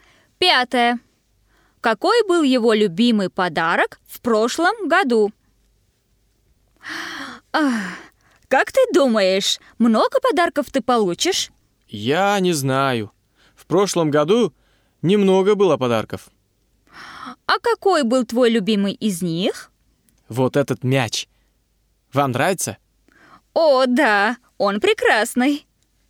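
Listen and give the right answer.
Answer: Мяч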